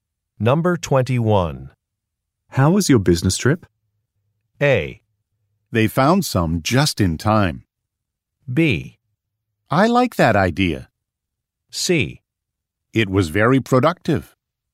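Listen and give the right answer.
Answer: C: It was very productive.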